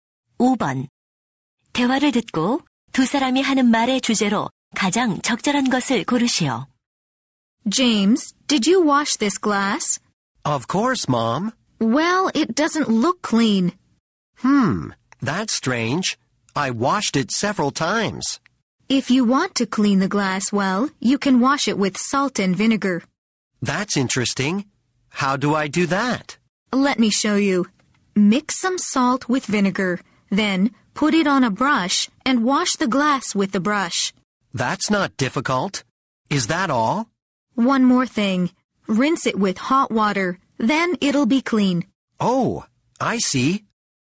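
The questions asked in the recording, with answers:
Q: 대화를 듣고 두 사람이 하는 말의 주제로 가장 적절한 것을 고르시오.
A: 소금과 식초로 유리잔을 깨끗이 닦는 방법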